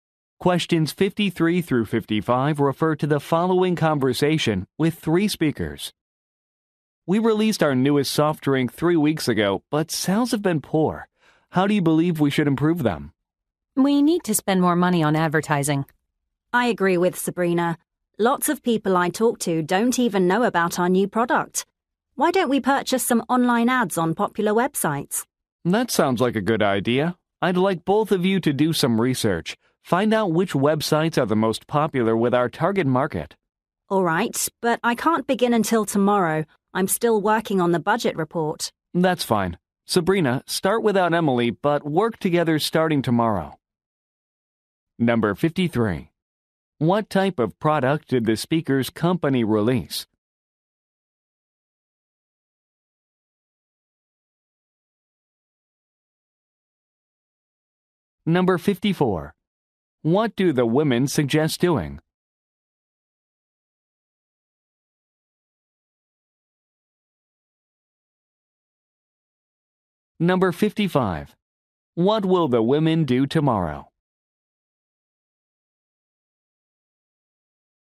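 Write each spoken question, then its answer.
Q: What type of product did the speaker's company release?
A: A soft drink

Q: What do the women suggest doing?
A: Spending more on advertising

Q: What will the women do tomorrow?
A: Work together researching popular websites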